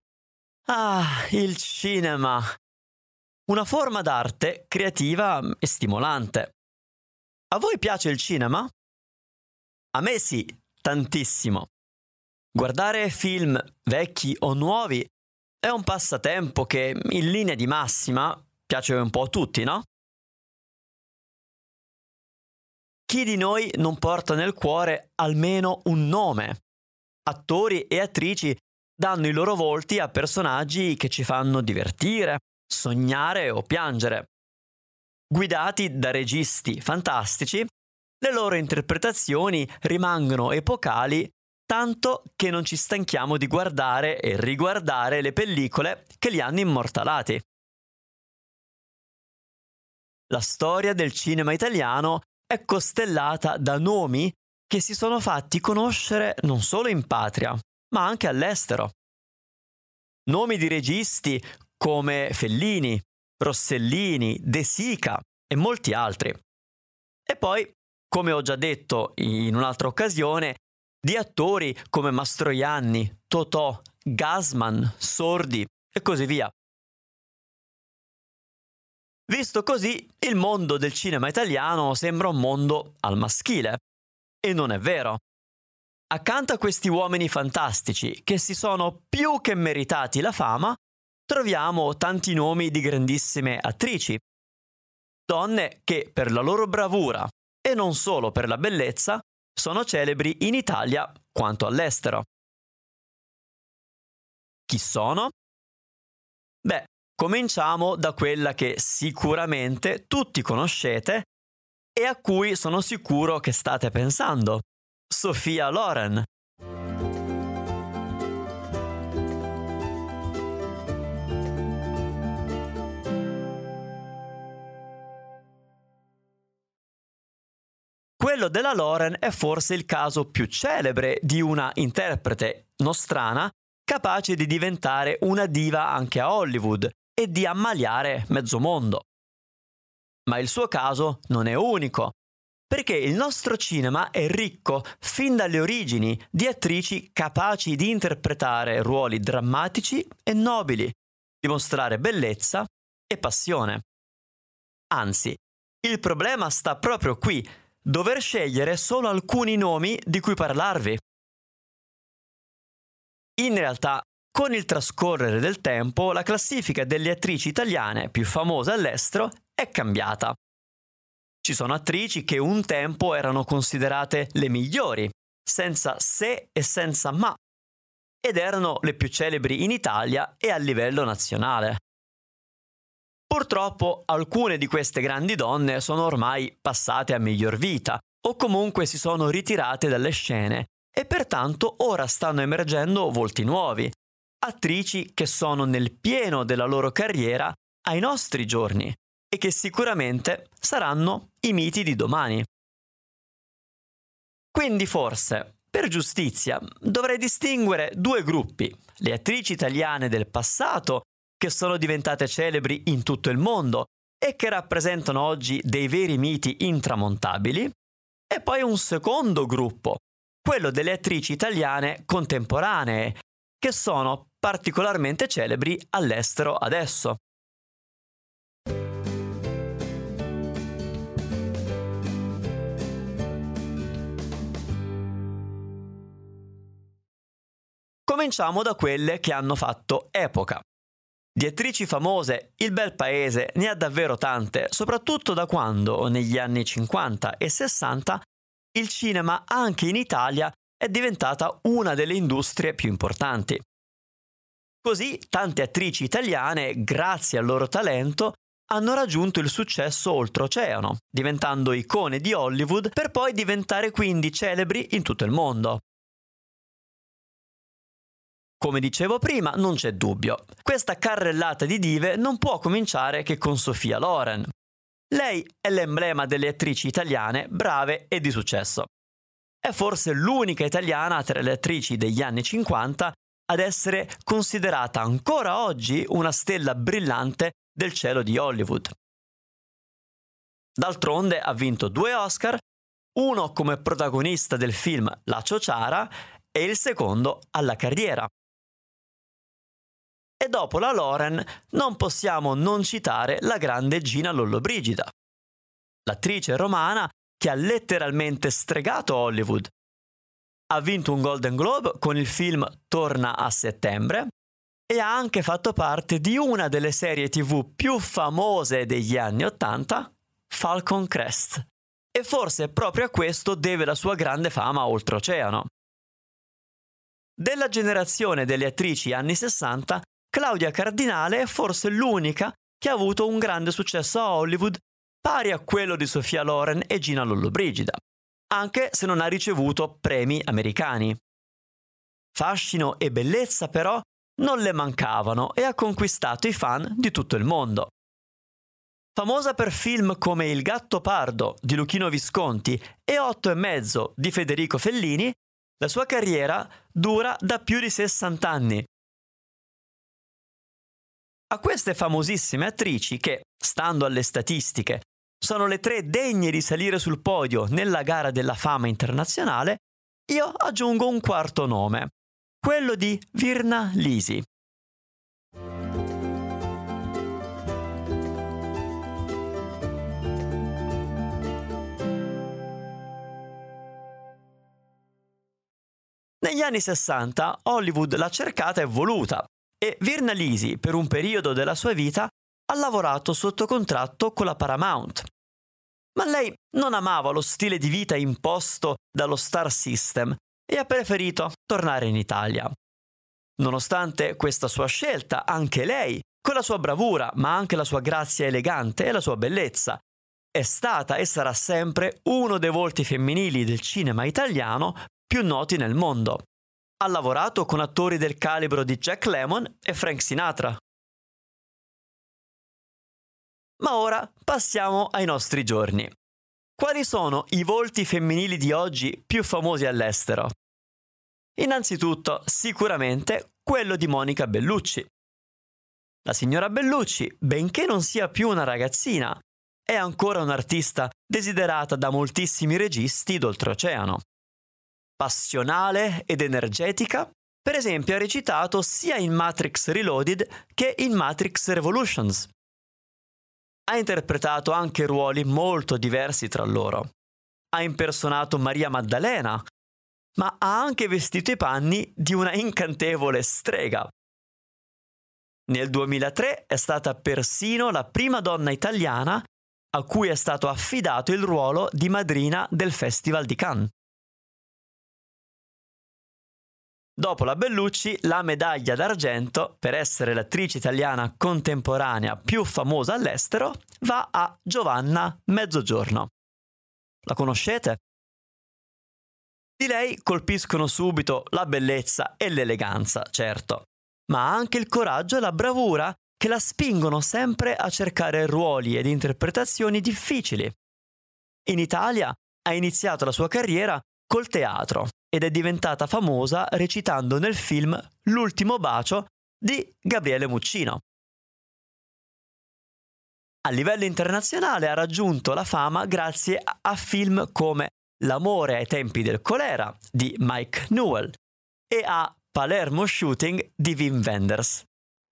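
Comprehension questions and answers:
Here are your TRUE/ FALSE Comprehension questions.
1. Il mondo del grande cinema italiano è esclusivamente al maschile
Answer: Falso

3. Con il tempo la classifica delle attrici italiane più famose è cambiata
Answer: Vero

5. Sophia Loren non ha mai lavorato a Hollywood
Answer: Falso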